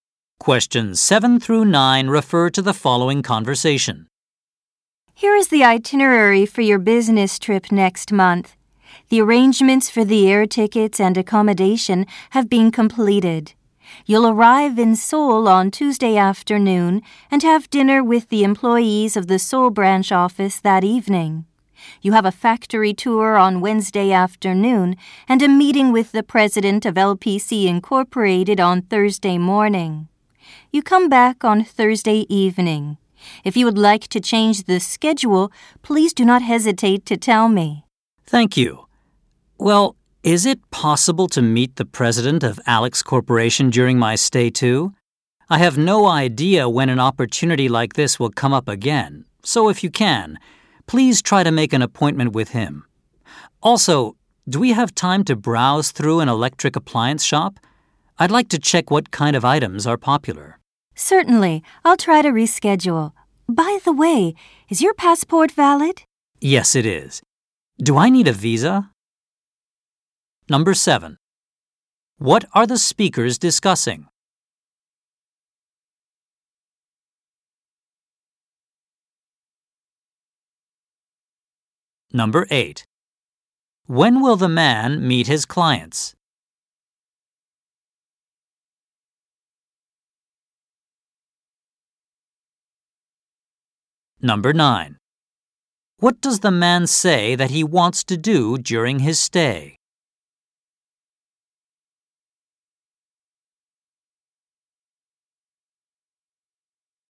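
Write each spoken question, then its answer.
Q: What are the speakers discussing?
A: The itinerary for a business trip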